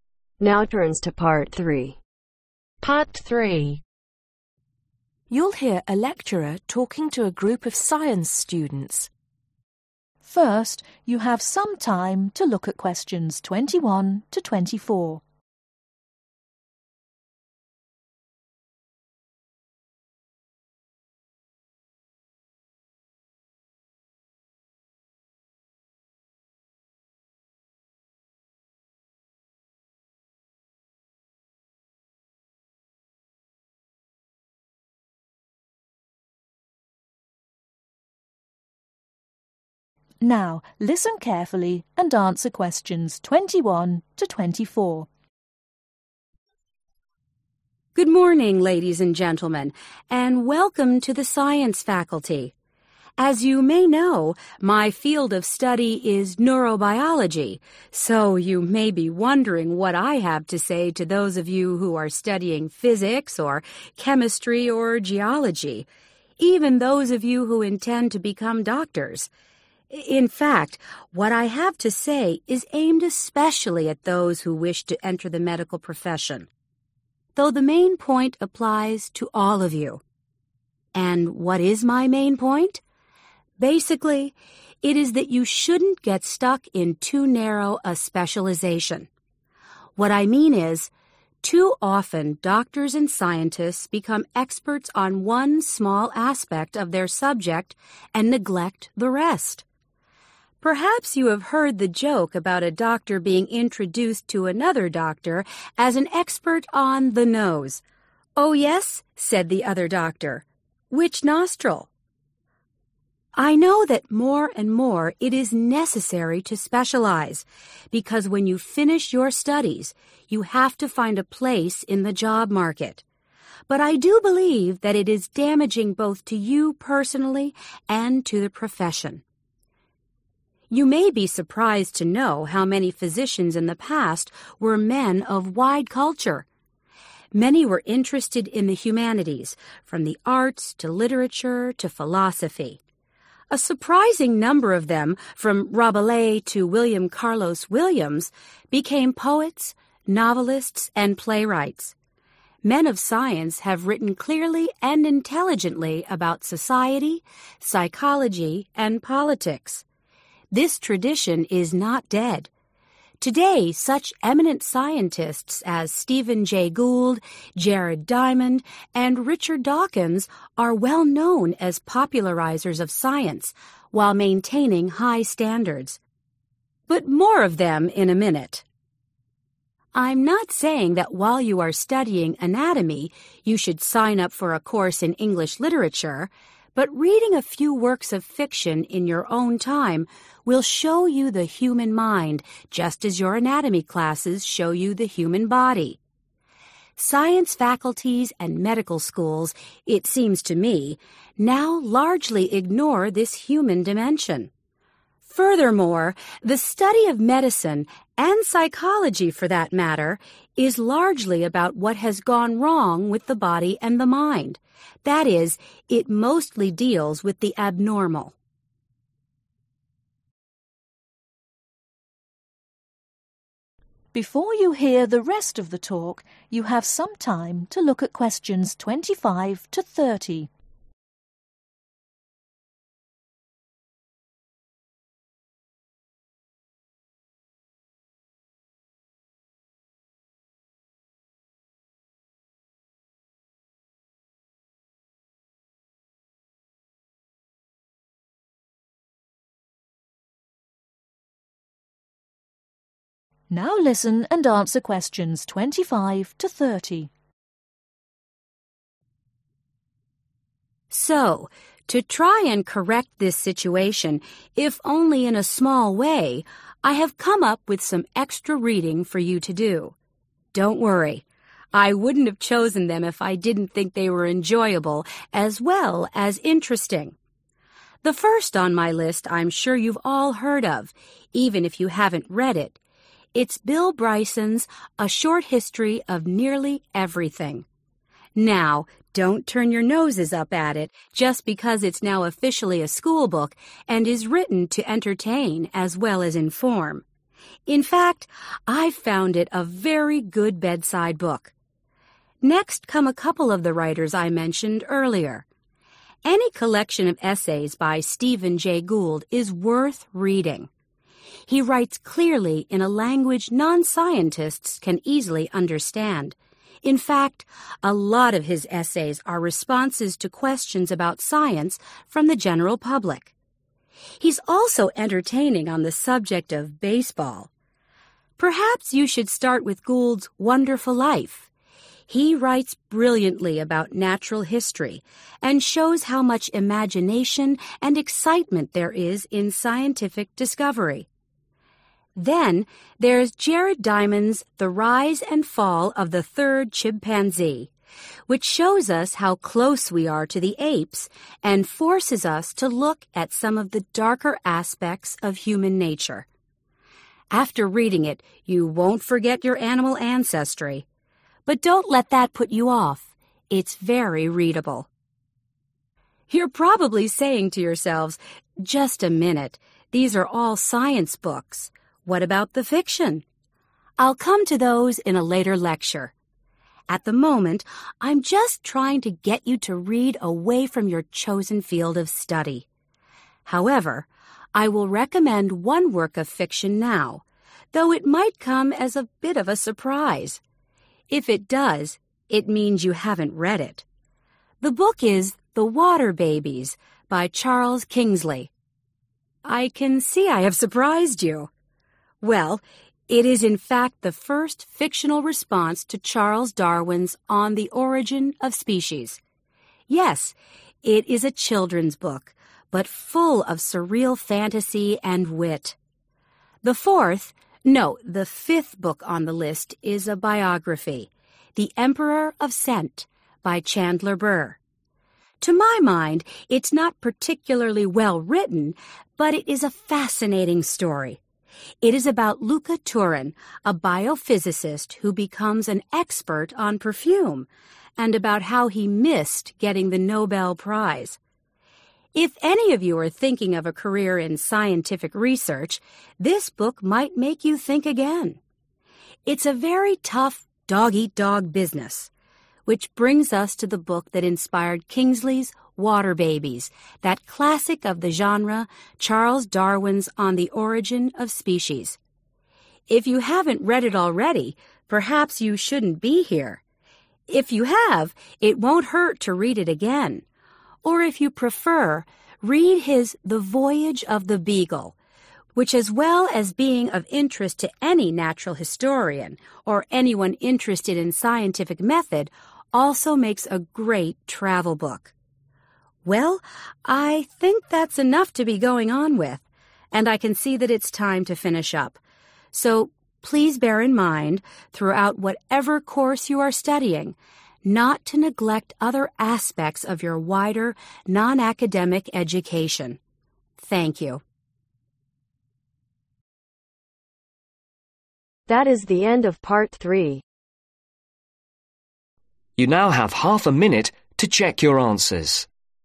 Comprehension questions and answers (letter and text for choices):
Complete the sentence below. Write NO MORE THAN TWO WORDS for each answer.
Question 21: The lecture is intended mainly for those entering the ............, but is relevant to all students present.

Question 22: The lecture believes that too ............ a specialization can be damaging.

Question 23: The number of ............ who were also writers is surprising.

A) It conveys the thrill of scientific discovery.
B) It is of internet to any natural historian.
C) This is a classic of scientific writing.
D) It is about the life of a scientist.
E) This book is now sometimes used in schools.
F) This is also a good travel book.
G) This book examines the dark side of human nature.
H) This book was a response to another book.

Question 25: A short history of nearly everything ............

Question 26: Wonderful Life ............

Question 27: The rise and fall of the Third Chimpanzee ............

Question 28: The water babies ............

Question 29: The Emperor of Scent ............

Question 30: On the Orign of Species ...........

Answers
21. medical profession
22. narrow
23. physicians
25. E) This book is now sometimes used in schools.
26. A) It conveys the thrill of scientific discovery.
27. G) This book examines the dark side of human nature.
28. H) This book was a response to another book.
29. D) It is about the life of a scientist.
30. C) This is a classic of scientific writing.